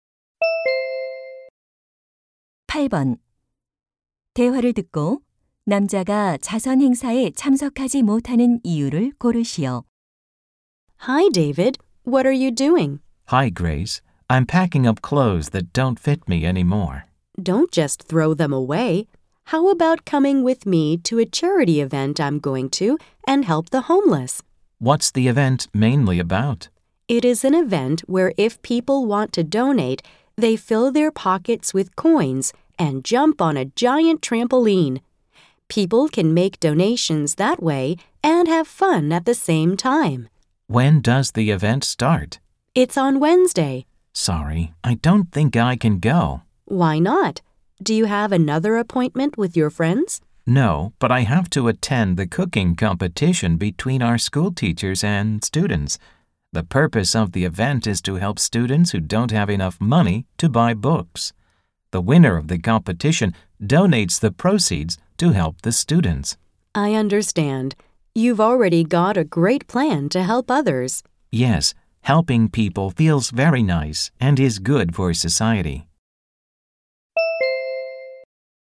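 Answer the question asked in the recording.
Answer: 교사와 학생 간 요리 대회에 참석해야 해서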